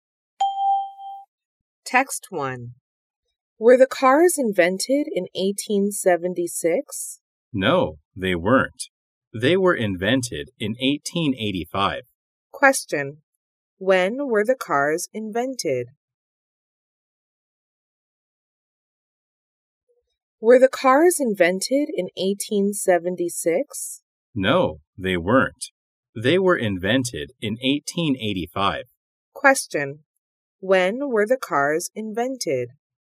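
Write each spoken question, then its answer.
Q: When were the cars invented?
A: In 1885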